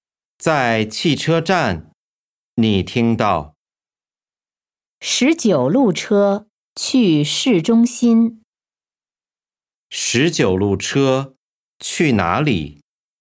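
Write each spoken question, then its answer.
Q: 十九路车去哪里?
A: 市中心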